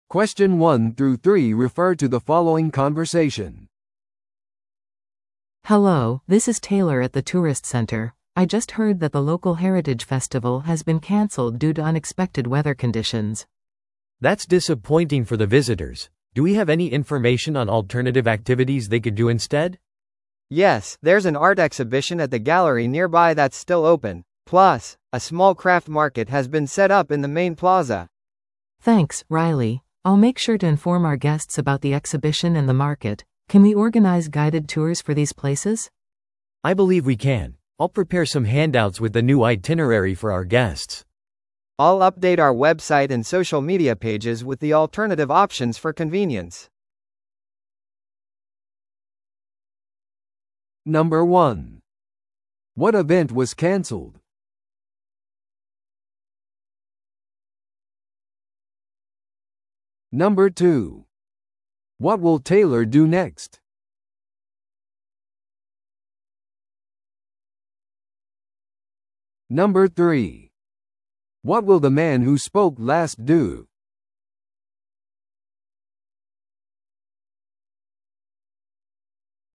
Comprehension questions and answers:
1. What event was canceled?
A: 文化祭。

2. What will Taylor do next?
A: 代わりの活動についてゲストに情報提供する。

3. What will the man who spoke last do?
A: ウェブサイトとソーシャルメディアを更新する。

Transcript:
A: Hello, this is Taylor at the tourist center. I just heard that the local heritage festival has been canceled due to unexpected weather conditions.
B: That's disappointing for the visitors. Do we have any information on alternative activities they could do instead?
C: Yes, there's an art exhibition at the gallery nearby that's still open. Plus, a small craft market has been set up in the main plaza.
A: Thanks, Riley. I'll make sure to inform our guests about the exhibition and the market. Can we organize guided tours for these places?
B: I believe we can. I'll prepare some handouts with the new itinerary for our guests.
C: I'll update our website and social media pages with the alternative options for convenience.